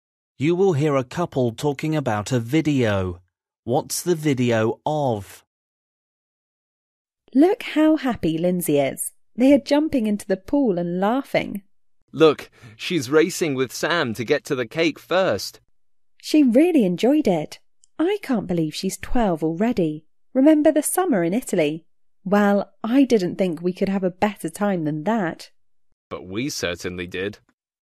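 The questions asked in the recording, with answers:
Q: What's the video of?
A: Lindsay's 12th birthday party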